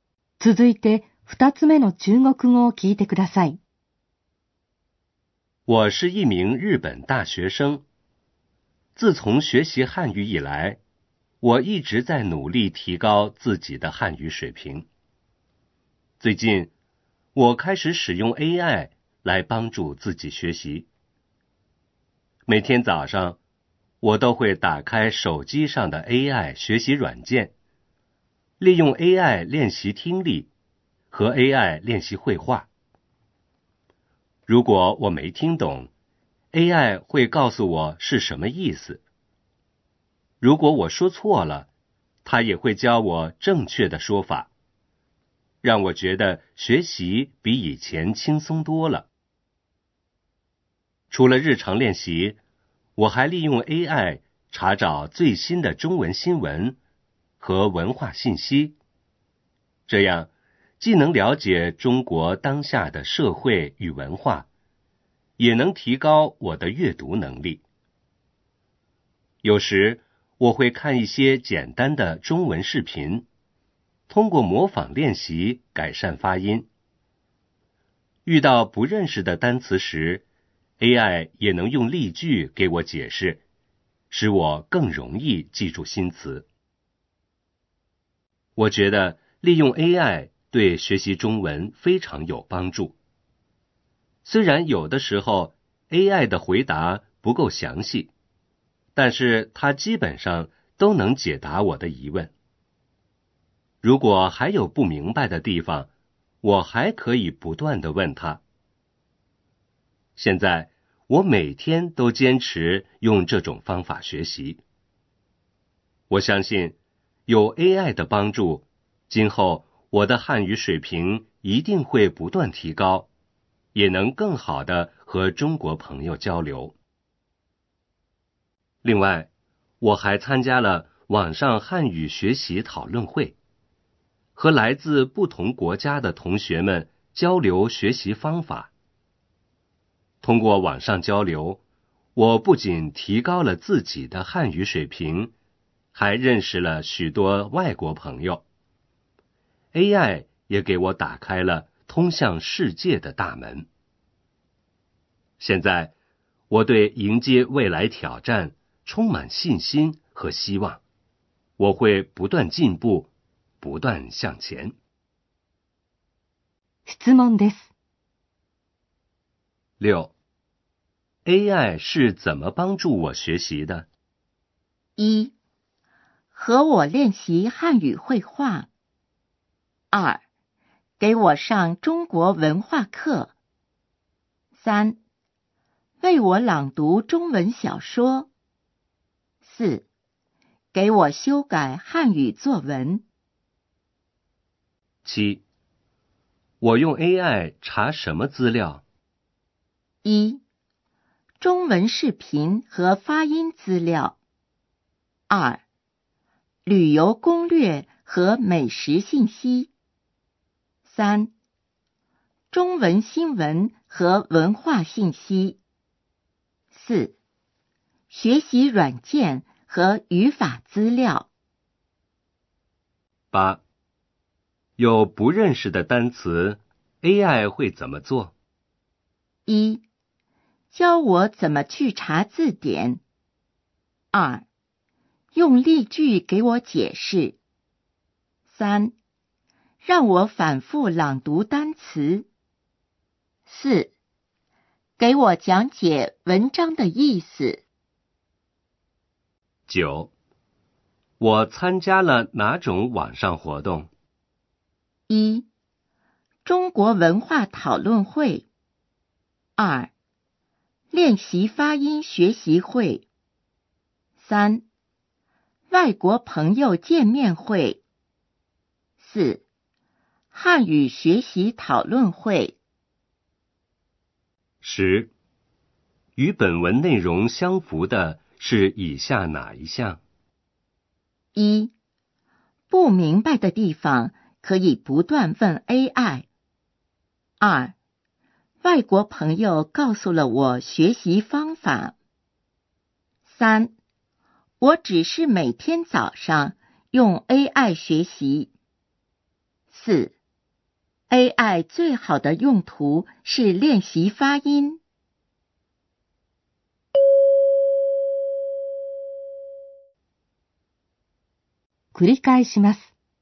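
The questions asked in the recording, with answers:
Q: AI 是怎么帮助我学习的?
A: 一: 和我练习汉语会话。

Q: 我用 AI 查什么资料?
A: 三: 中文新闻和文化信息。

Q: 有不认识的单词 ,AI 会怎么做?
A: 二: 用例句给我解释。

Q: 我参加了哪种网上活动?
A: 四: 汉语学习讨论会。

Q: 与本文内容相符的是以下哪一项?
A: 一: 不明白的地方可以不断问 AI。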